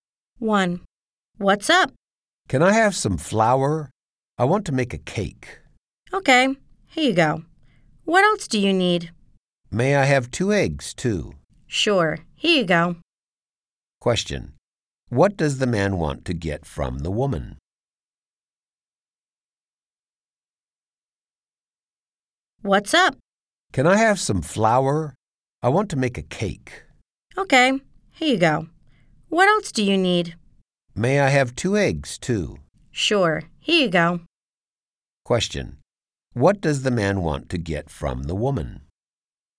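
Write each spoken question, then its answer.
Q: What does the man want to get from the woman?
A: Some flour and two eggs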